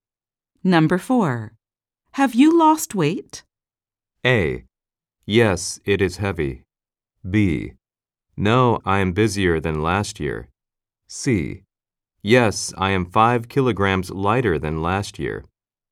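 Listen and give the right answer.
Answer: C: Yes, I am 5 kilograms lighter than last year.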